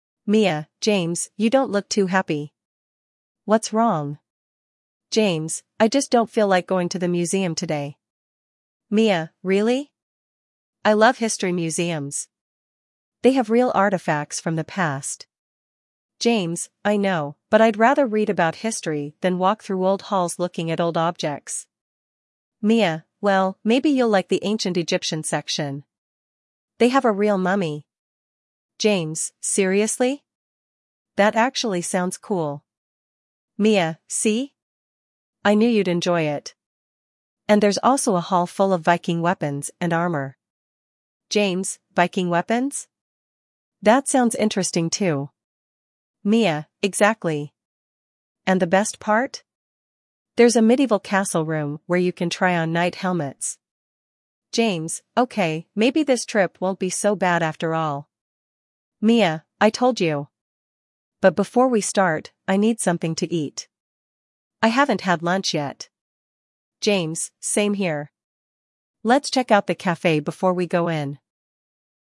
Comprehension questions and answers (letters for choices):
1. Вы услышите диалог. Для каждого вопроса А–Е выберите один правильный вариант ответа из трёх предложенных (1, 2 или 3). Вы услышите запись дважды.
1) Why is James unhappy?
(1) He is sick.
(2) He doesn't like museums.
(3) He forgot about his project.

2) What does Mia think about history museums?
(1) They are boring.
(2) They are interesting.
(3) They are too expensive.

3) What part of the museum might interest James?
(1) Ancient Egyptian mummies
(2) Medieval castles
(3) The Roman Empire exhibit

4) What does James say about his morning?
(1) He forgot his notebook.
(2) He was late to school.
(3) He hasn't eaten since breakfast.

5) What do Mia and James decide to do before visiting the exhibit?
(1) Visit the gift shop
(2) Eat at the café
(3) Take pictures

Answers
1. 2
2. 2
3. 1
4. 3
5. 2

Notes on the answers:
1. James is unhappy because he doesn't like museums → 2
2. Mia thinks history museums are interesting → 2
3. James is interested in the Egyptian mummy → 1
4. James hasn't eaten since breakfast → 3
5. They decide to eat at the café before visiting → 2

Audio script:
Mia: James, you don't look too happy. What's wrong?
James: I just don't feel like going to the museum today.
Mia: Really? I love history museums! They have real artifacts from the past.
James: I know, but I'd rather read about history than walk through old halls looking at old objects.
Mia: Well, maybe you'll like the ancient Egyptian section. They have a real mummy!
James: Seriously? That actually sounds cool.
Mia: See? I knew you'd enjoy it. And there's also a hall full of Viking weapons and armor.
James: Viking weapons? That sounds interesting too.
Mia: Exactly! And the best part? There's a medieval castle room where you can try on knight helmets.
James: Okay, maybe this trip won't be so bad after all.
Mia: I told you! But before we start, I need something to eat. I haven't had lunch yet.
James: Same here. Let's check out the café before we go in.